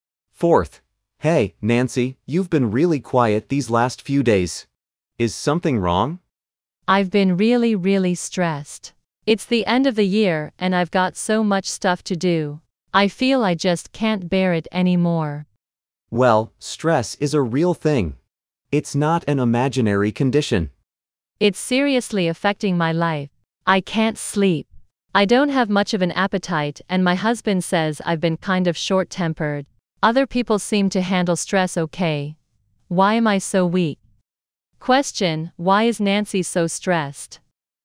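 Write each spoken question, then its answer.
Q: Why is Nancy so stressed?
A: She has too much work to do at the end of the year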